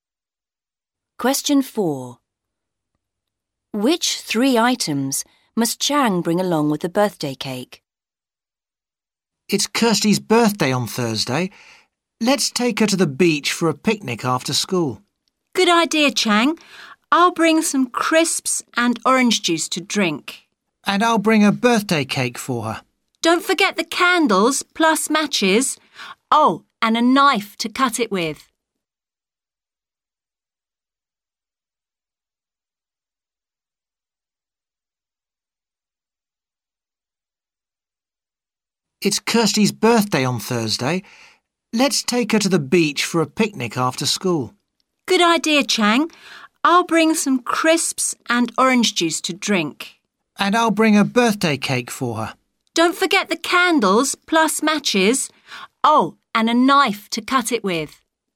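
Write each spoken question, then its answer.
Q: Which three items must Chang bring along with the birthday cake?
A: Candles, matches and a knife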